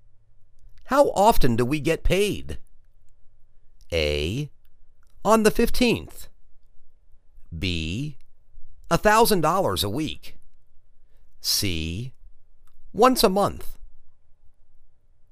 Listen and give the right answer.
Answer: Once a month.